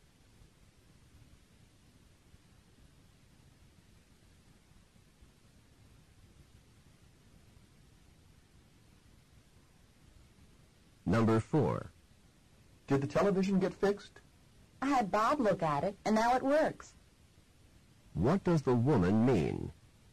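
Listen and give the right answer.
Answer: Bob fixed the television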